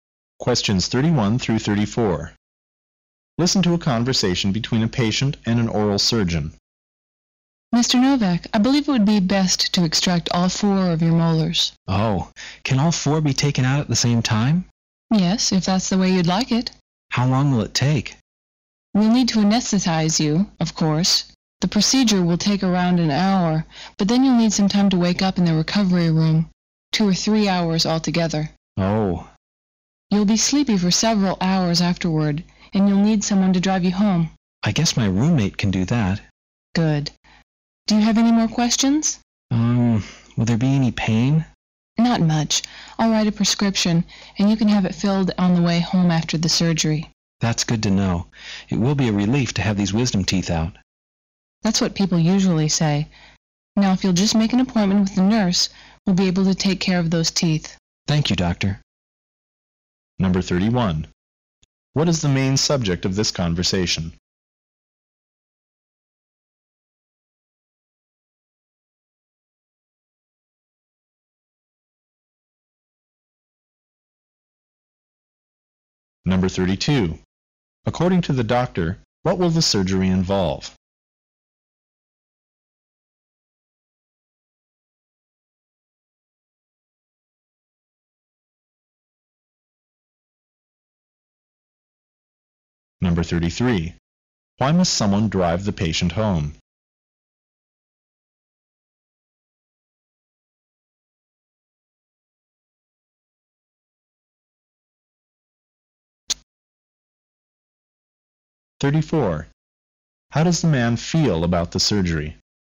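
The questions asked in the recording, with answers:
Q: What is the main subject of this conversation?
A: Removing the man's wisdom teeth.

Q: According to the doctor, what will the surgery involve?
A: Taking out all four molars under anesthesia, about an hour plus recovery.

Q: Why must someone drive the patient home?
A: He will be sleepy from the anesthetic.

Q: How does the man feel about the surgery?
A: Relieved to have his wisdom teeth out.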